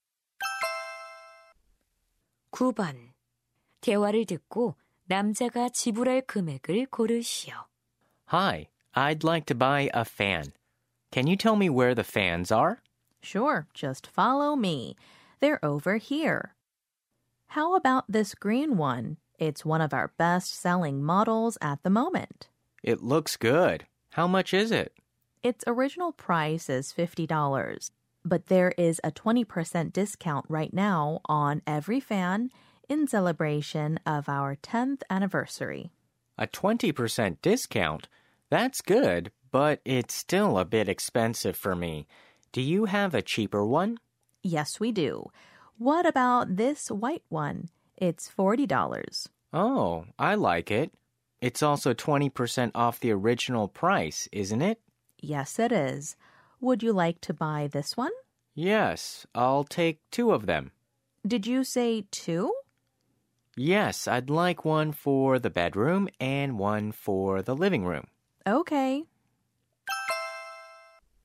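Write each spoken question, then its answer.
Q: 대화를 듣고 남자가 지불할 금액을 고르시오.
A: $64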